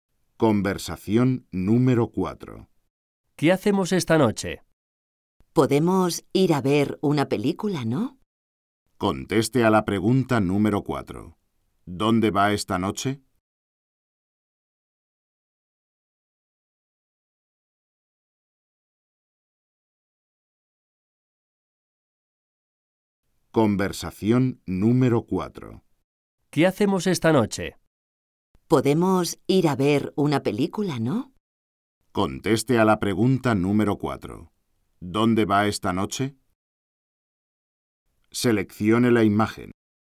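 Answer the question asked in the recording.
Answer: Al cine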